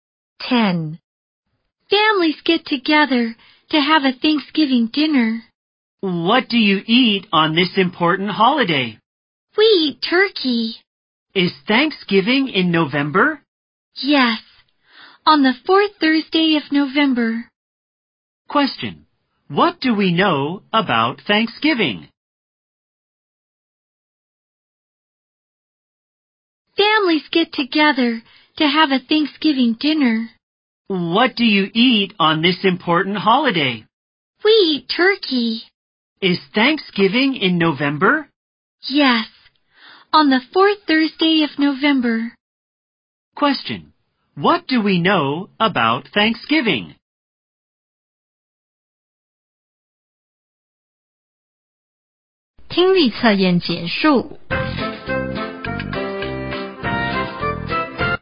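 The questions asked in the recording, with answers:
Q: Question. What do we know about Thanksgiving?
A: It is on the fourth Thursday of November, and families eat turkey together.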